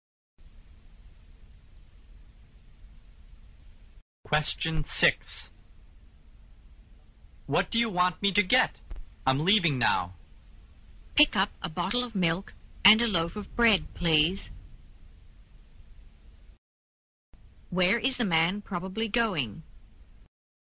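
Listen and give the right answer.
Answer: To a grocery store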